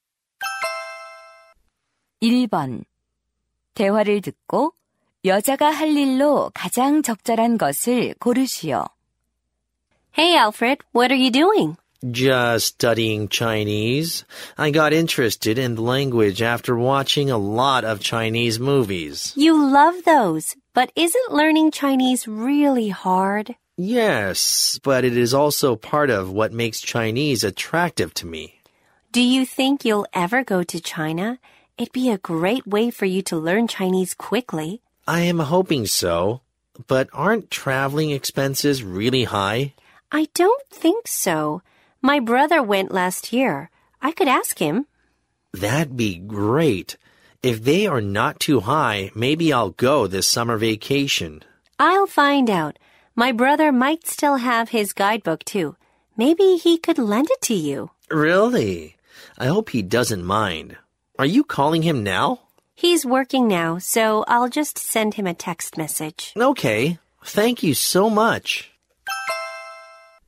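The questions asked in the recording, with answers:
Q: 대화를 듣고 여자가 할 일로 가장 적절한 것을 고르시오.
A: 오빠(남동생)에게 문자 메시지 보내기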